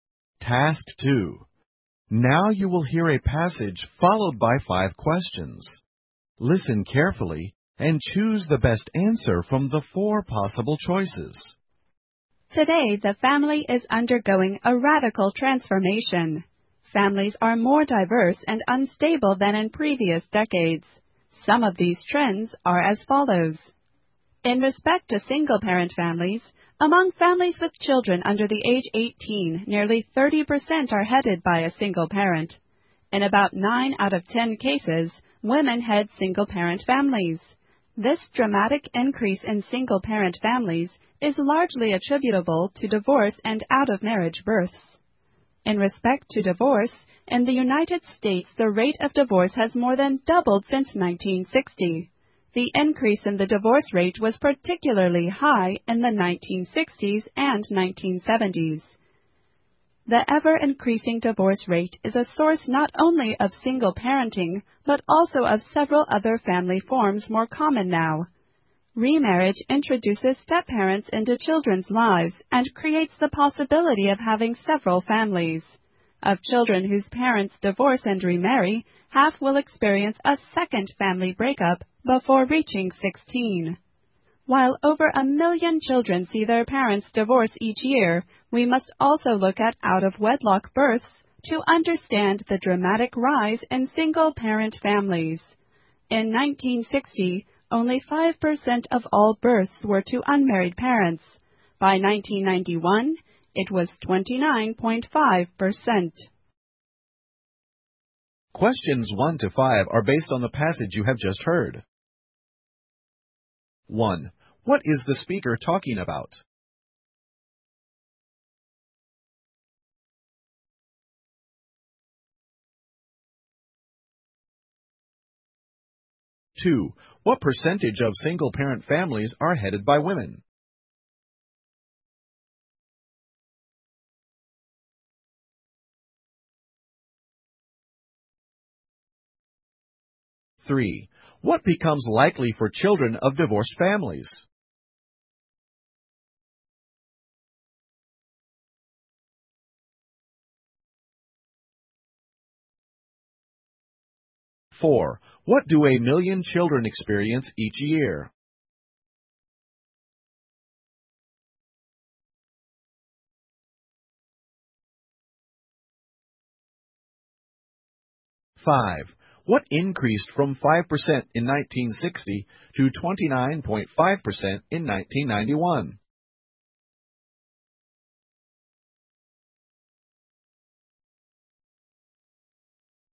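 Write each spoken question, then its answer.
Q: What is the speaker talking about?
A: Changes in the family today

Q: What percentage of single-parent families are headed by women?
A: About 90%

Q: What do 1 million children experience each year?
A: Their parents' divorce

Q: What increased from 5% in 1960 to 29.5% in 1991?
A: Births to unmarried parents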